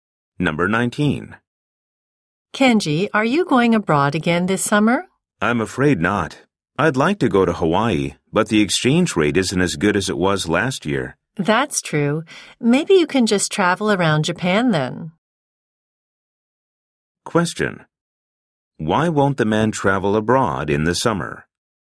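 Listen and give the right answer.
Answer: The exchange rate is not as good as last year.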